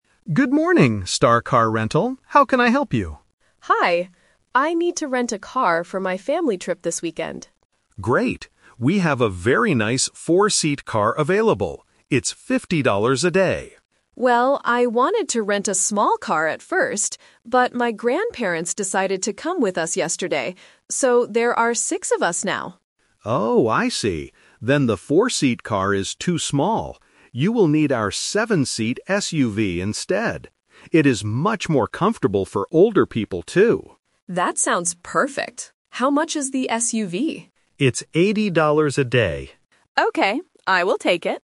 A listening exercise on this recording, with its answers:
Listen to the conversation between a customer and a car rental agent. Choose the correct answer (A, B, or C) for each question.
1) Who is going on the trip with the customer's family?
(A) Her friends.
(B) Her grandparents.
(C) Her cousins.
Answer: Her grandparents.

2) What kind of car does the customer rent at the end?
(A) A small four-seat car.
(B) A seven-seat SUV.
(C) A large bus.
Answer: A seven-seat SUV.

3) How much will the customer pay per day?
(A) $50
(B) $60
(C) $80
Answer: $80

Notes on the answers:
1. The customer explains why she needs a bigger car: "my grandparents decided to come with us yesterday." Options (A) and (C) are plausible people to travel with, but they are not mentioned in the audio.
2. This is "The Twist". The customer wanted a small car at first, and the agent suggested a four-seat car (Option A - the trap). However, because there are six people now, the agent says, "You will need our seven-seat SUV instead", and the customer agrees. Option (C) is not mentioned.
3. The customer asks, "How much is the SUV?" and the agent replies, "It's $80 a day." Option (A) is the trap because $50 is the price of the smaller four-seat car. Option (B) is a random number not mentioned.

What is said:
Agent: Good morning, Star Car Rental. How can I help you?
Customer: Hi. I need to rent a car for my family trip this weekend.
Agent: Great. We have a very nice four-seat car available. It's $50 a day.
Customer: Well, I wanted to rent a small car at first, but my grandparents decided to come with us yesterday. So, there are six of us now.
Agent: Oh, I see. Then the four-seat car is too small. You will need our seven-seat SUV instead. It is much more comfortable for older people, too.
Customer: That sounds perfect. How much is the SUV?

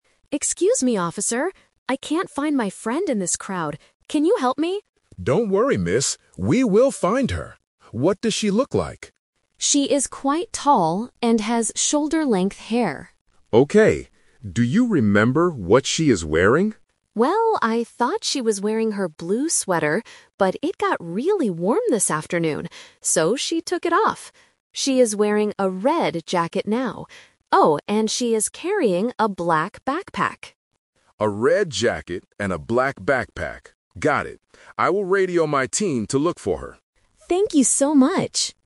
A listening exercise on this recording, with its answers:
Listen to the conversation between a girl and a security guard. Choose the correct answer (A, B, or C) for each question.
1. What does the girl's friend look like?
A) She is short with long hair.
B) She is tall with shoulder-length hair.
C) She is tall with short hair.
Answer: She is tall with shoulder-length hair.

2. What is the friend wearing right now?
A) A blue sweater.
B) A red jacket.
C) A black jacket.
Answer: A red jacket.

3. What else does the friend have with her?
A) A black backpack.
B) A blue bag.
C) A red hat.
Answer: A black backpack.

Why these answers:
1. The girl clearly describes her friend's appearance: "She is quite tall and has shoulder-length hair." Options (A) and (C) have incorrect details about her height or hair length.
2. This is "The Twist". The girl says she thought her friend was wearing a blue sweater (Option A - the trap), but because it got warm, she took it off. She says, "She is wearing a red jacket now." Option (C) is a trap that mixes the color of the backpack with the clothing item.
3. At the end of her description, the girl adds: "Oh, and she is carrying a black backpack." Option (B) uses the color of the sweater. Option (C) uses the color of the jacket.

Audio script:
Girl: Excuse me, officer. I can't find my friend in this crowd. Can you help me?
Security Guard: Don't worry, miss. We will find her. What does she look like?
Girl: She is quite tall and has shoulder-length hair.
Security Guard: Okay. Do you remember what she is wearing?
Girl: Well, I thought she was wearing her blue sweater, but it got really warm this afternoon. So, she took it off. She is wearing a red jacket now. Oh, and she is carrying a black backpack.
Security Guard: A red jacket and a black backpack. Got it. I will radio my team to look for her.
Girl: Thank you so much!

